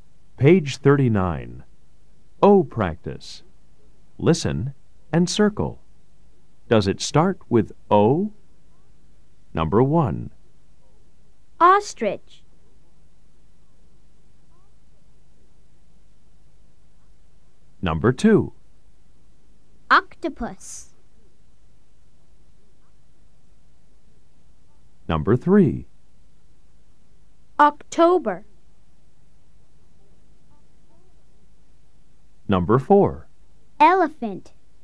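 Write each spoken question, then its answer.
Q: Does it start with O? Number 1. Ostrich.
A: Yes

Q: Number 2. Octopus.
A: Yes

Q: Number 3. October.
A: Yes

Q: Number 4. Elephant.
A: No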